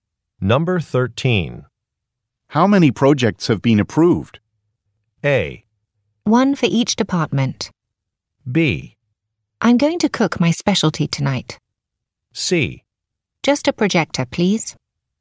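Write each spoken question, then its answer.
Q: How many projects have been approved?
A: A: One for each department.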